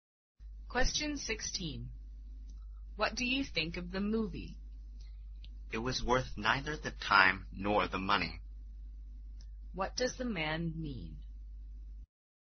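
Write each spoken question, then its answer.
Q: What does the man mean?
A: The movie was a waste of time and money.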